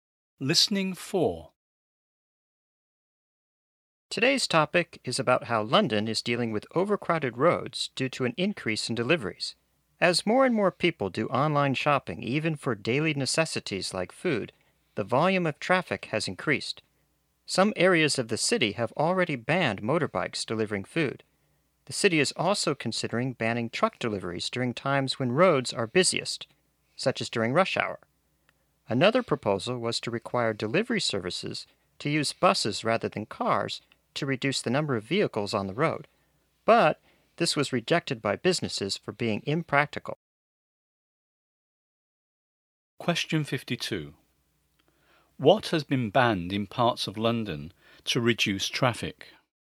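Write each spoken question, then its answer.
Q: What has been banned in parts of London to reduce traffic?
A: Motorbikes delivering food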